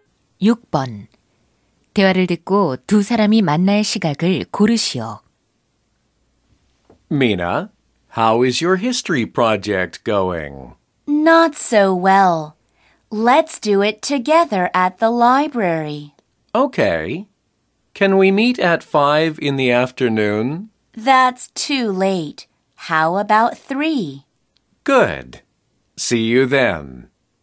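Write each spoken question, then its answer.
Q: 대화를 듣고 두 사람이 만날 시각을 고르시오.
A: 오후 3시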